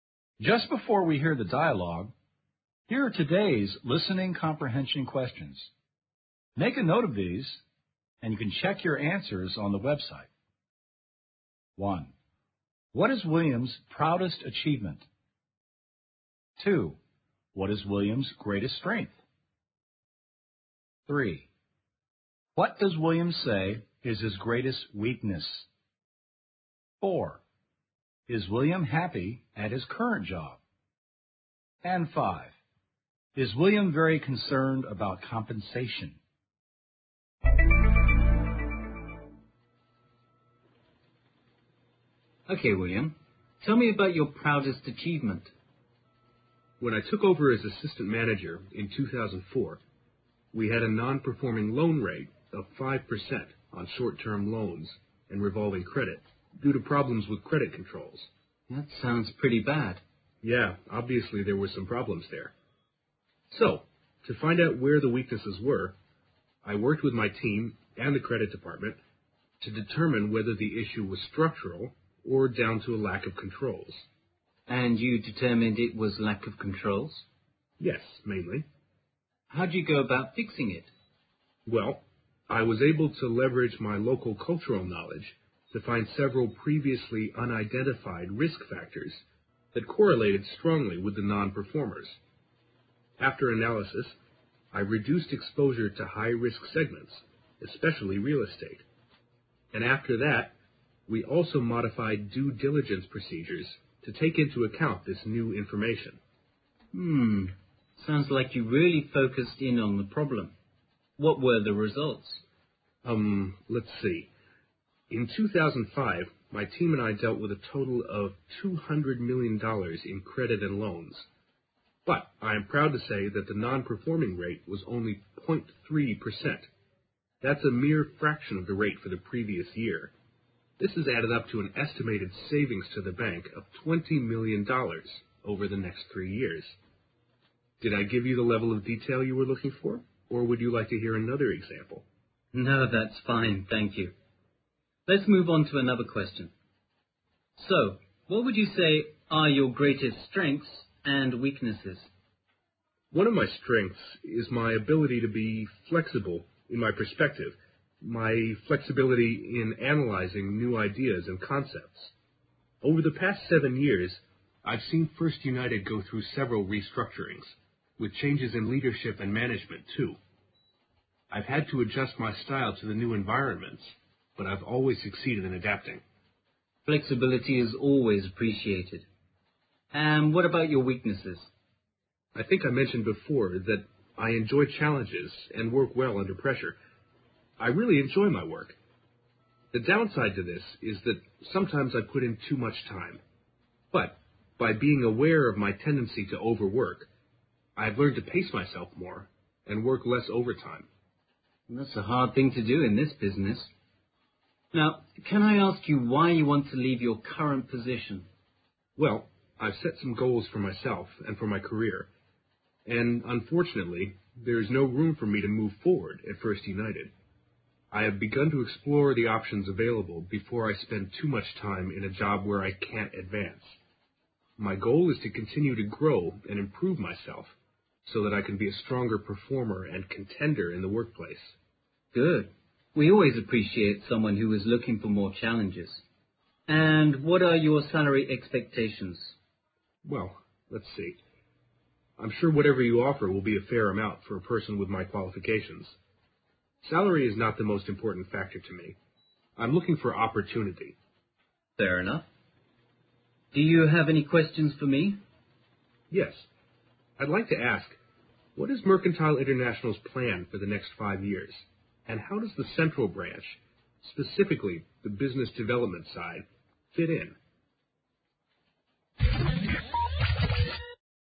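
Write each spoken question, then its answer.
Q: What is William's proudest achievement?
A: Cutting the non-performing loan rate from 5% to 0.3%, saving the bank an estimated $20 million

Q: What is William's greatest strength?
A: Flexibility in his perspective and in analyzing new ideas

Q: What does William say is his greatest weakness?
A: He sometimes works too much (overworks)

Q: Is William happy at his current job?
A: No, there is no room for him to advance

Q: Is William very concerned about compensation?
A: No, salary is not the most important factor for him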